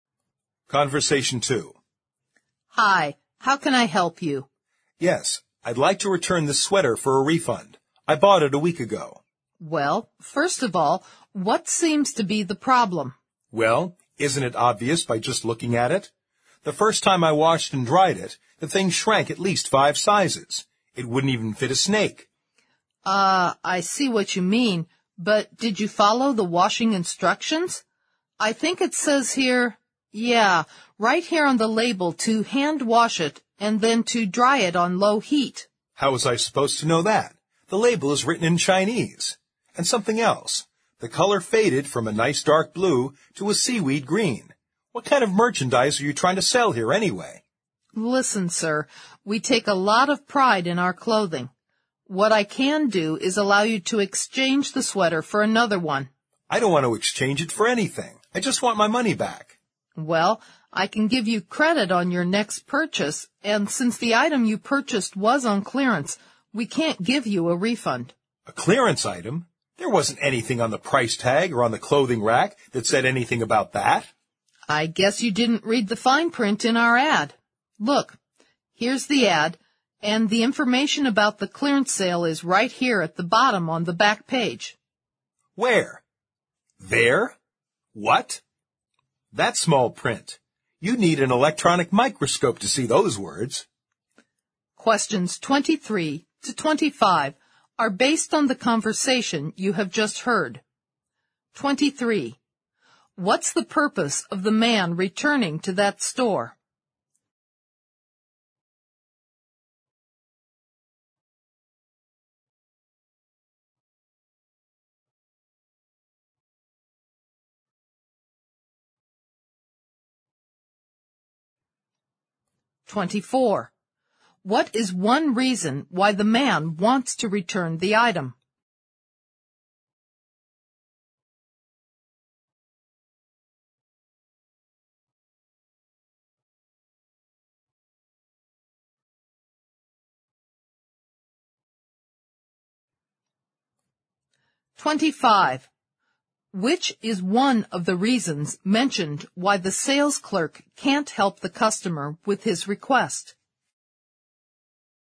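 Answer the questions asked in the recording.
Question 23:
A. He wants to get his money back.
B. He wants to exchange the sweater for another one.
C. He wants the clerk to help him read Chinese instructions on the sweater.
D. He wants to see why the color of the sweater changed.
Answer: A. He wants to get his money back.
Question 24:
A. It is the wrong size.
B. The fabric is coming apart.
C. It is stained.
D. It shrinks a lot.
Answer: D. It shrinks a lot.
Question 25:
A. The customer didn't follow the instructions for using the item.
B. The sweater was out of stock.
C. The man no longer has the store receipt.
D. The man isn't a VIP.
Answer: A. The customer didn't follow the instructions for using the item.

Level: 四级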